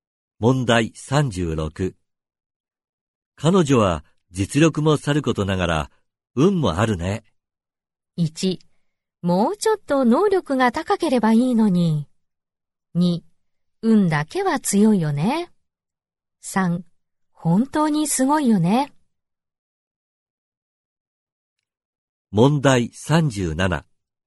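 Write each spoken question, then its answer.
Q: 彼女は実力もさることながら、運もあるね。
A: 3: 本当にすごいよね。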